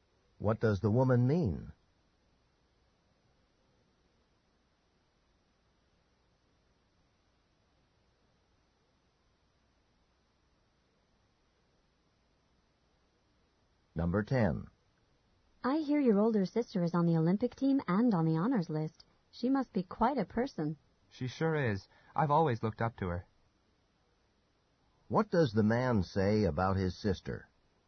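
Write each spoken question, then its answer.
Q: What does the man say about his sister?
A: He has always admired her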